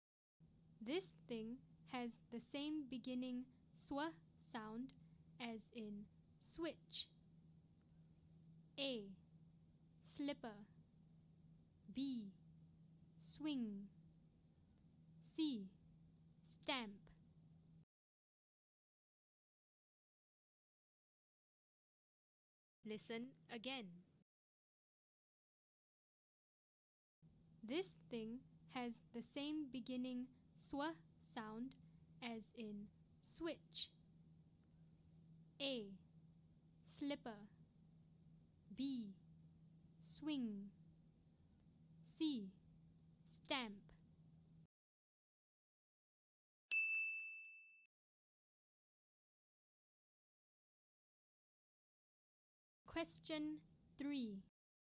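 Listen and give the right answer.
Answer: B: Swing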